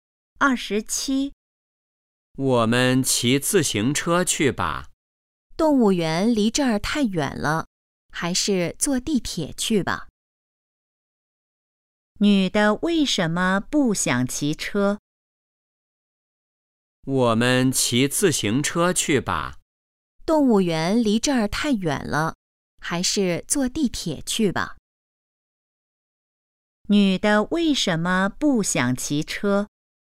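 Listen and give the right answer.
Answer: 动物园离这儿太远了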